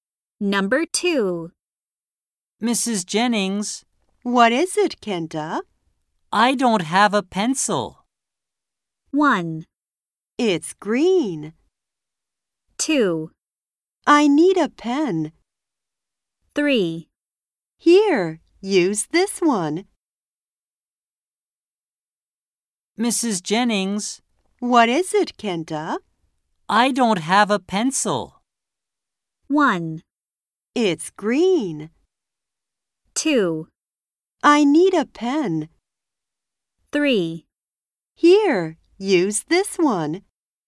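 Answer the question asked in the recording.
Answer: 3: Here, use this one.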